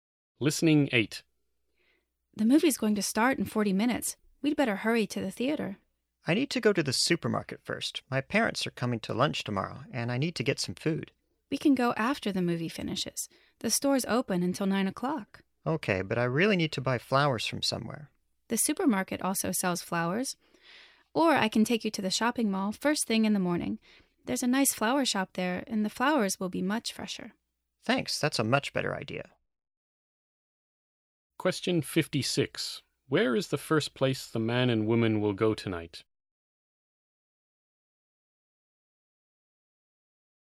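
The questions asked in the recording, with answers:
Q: Where is the first place the man and woman will go tonight?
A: The movie theater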